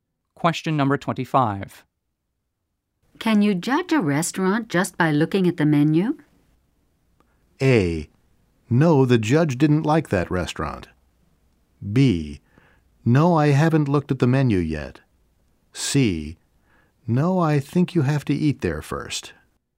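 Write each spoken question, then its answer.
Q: Can you judge a restaurant just by looking at the menu?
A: C: No, I think you have to eat there first.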